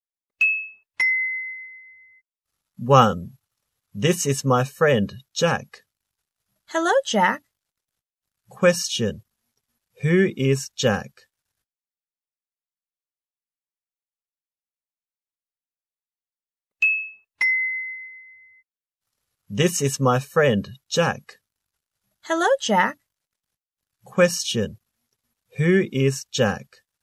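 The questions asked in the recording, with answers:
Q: Who is Jack?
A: The speaker's friend.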